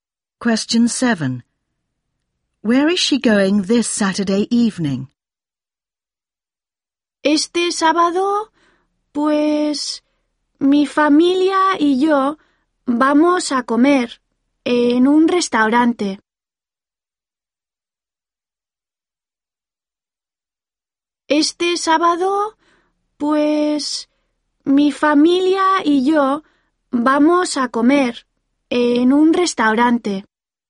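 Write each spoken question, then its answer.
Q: Where is she going this Saturday evening?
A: To a restaurant (with her family)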